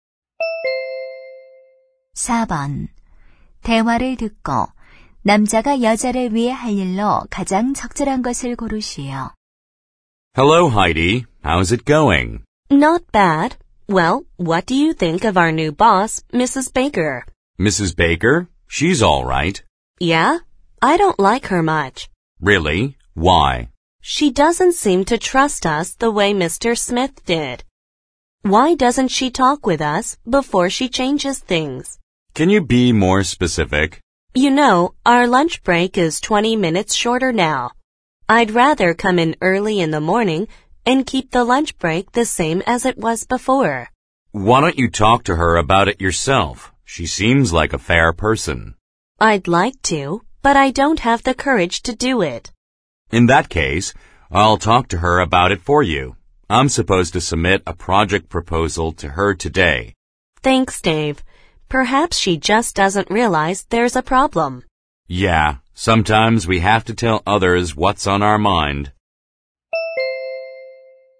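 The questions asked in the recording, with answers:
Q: 대화를 듣고 남자가 여자를 위해 할 일로 가장 적절한 것을 고르시오.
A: 새 상사에게 점심시간 문제에 대해 대신 이야기하기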